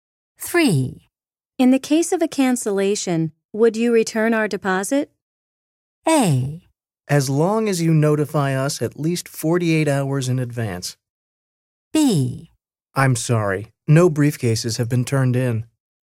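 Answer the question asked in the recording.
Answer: A: As long as you notify us at least 48 hours in advance.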